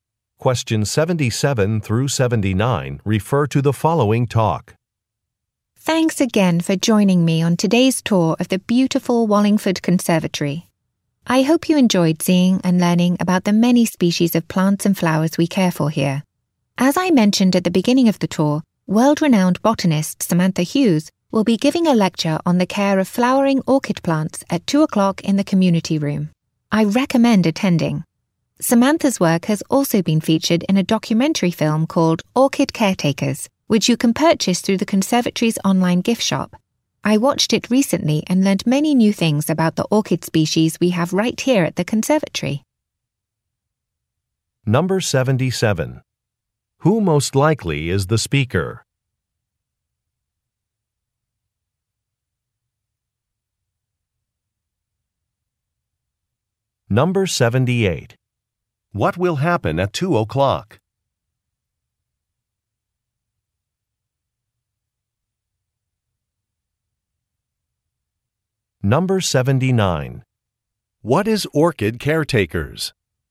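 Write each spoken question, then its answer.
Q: Who most likely is the speaker?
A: A tour guide at the conservatory

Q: What will happen at 2 o'clock?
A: A lecture on caring for orchids

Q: What is Orchid Caretakers?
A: A documentary film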